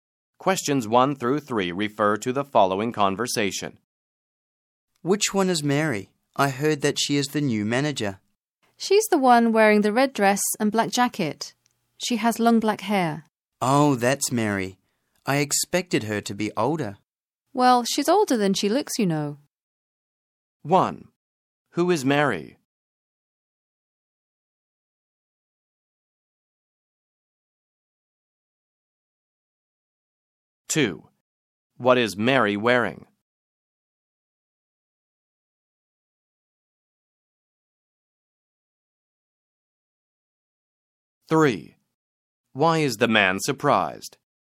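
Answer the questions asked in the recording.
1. The new manager
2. A red dress and black jacket
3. Mary looks younger than he expected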